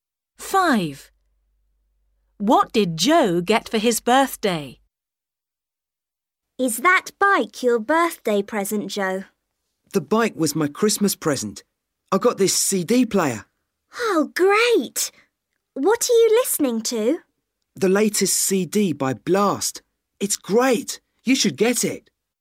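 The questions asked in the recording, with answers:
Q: What did Joe get for his birthday?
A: a CD player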